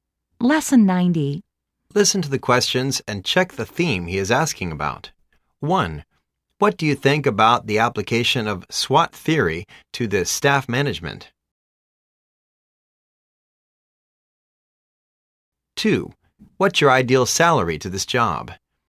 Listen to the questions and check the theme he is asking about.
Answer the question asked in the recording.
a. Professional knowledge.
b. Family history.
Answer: a. Professional knowledge.